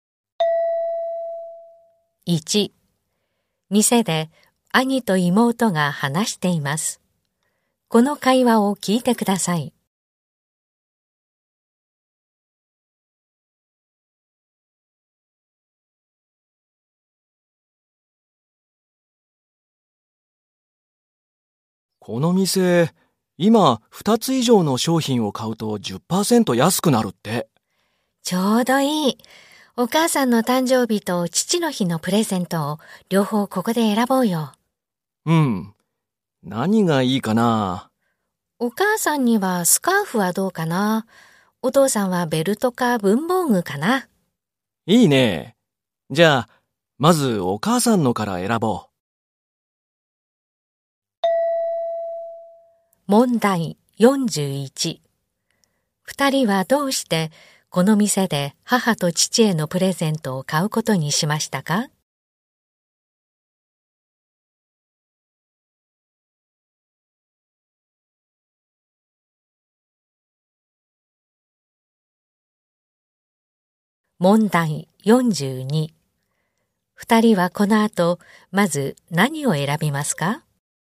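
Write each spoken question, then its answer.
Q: 二人はどうしてこの店で母と父へのプレゼントを買うことにしましたか?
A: 2つ以上買うと10%安くなるから

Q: 二人はこの後まず何を選びますか?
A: お母さんのスカーフ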